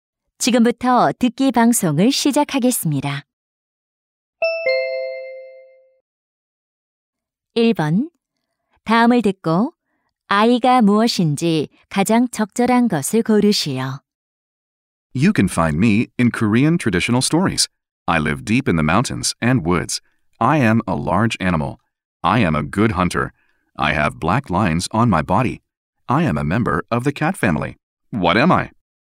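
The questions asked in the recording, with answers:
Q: 다음을 듣고 아이가 무엇인지 가장 적절한 것을 고르시오.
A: 호랑이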